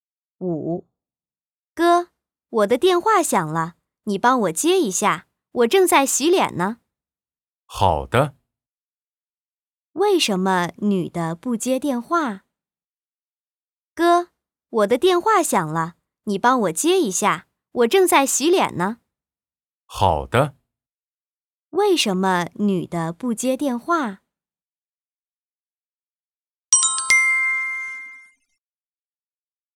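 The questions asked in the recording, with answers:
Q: 为什么女的不接电话?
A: 她正在洗脸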